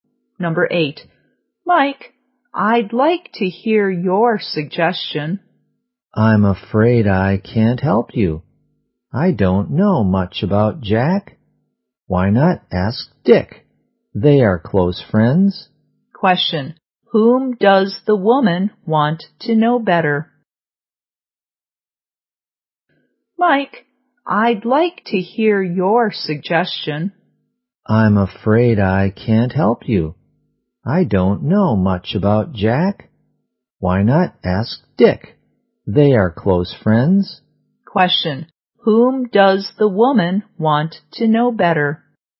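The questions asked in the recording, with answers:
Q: Whom does the woman want to know better?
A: Jack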